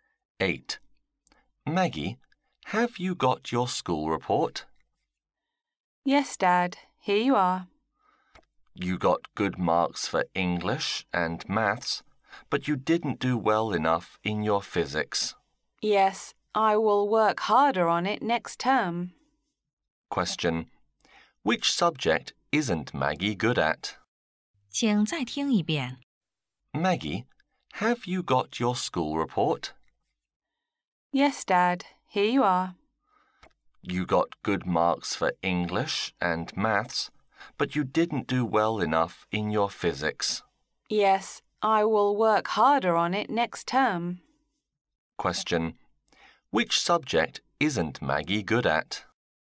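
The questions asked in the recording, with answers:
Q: Which subject isn't Maggie good at?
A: Physics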